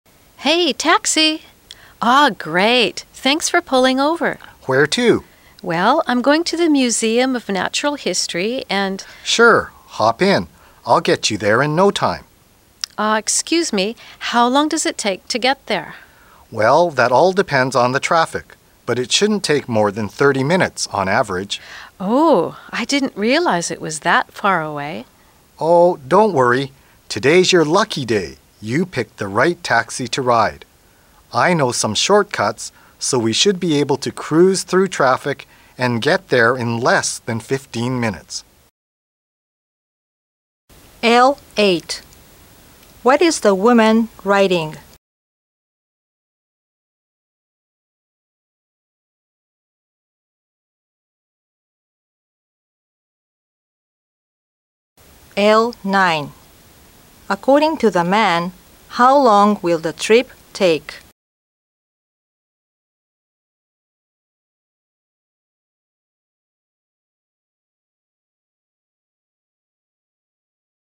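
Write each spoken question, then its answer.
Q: According to the man, how long will the trip take?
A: Less than 15 minutes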